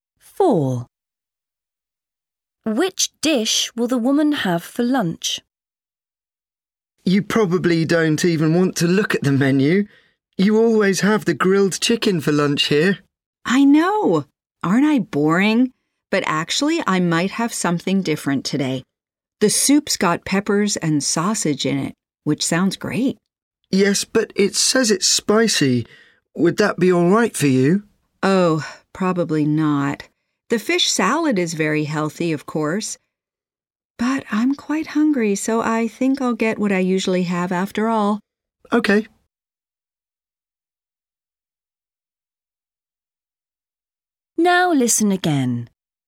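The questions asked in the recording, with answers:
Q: Which dish will the woman have for lunch?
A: Grilled chicken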